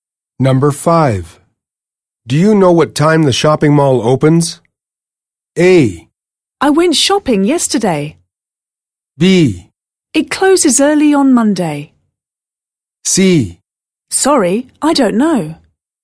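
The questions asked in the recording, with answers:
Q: Do you know what time the shopping mall opens?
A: C: Sorry, I don't know.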